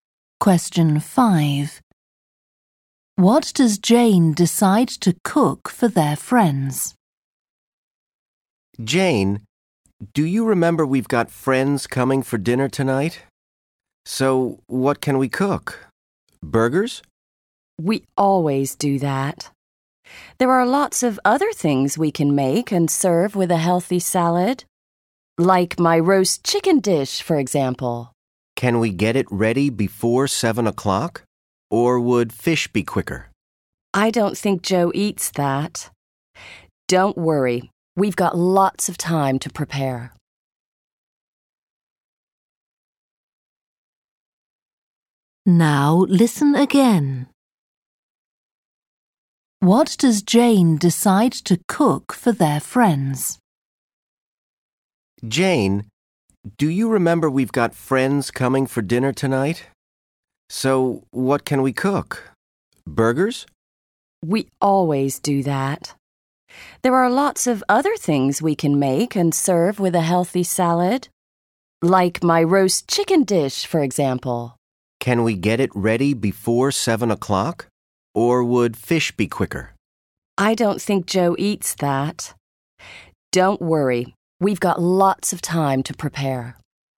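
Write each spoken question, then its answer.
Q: What does Jane decide to cook for their friends?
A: Roast chicken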